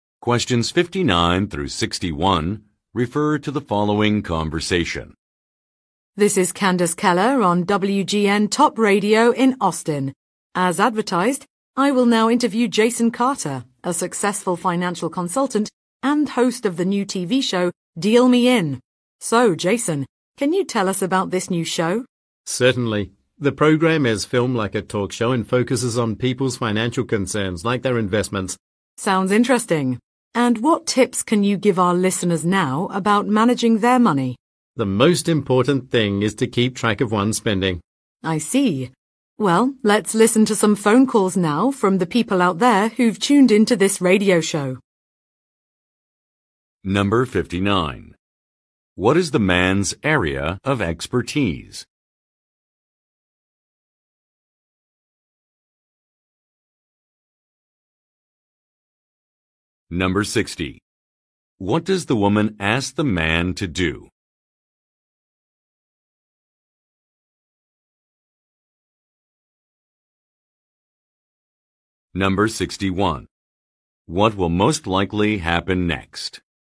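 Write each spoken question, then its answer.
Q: What is the man's area of expertise?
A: Finance (financial consulting)

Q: What will most likely happen next?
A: Listeners' phone calls will be taken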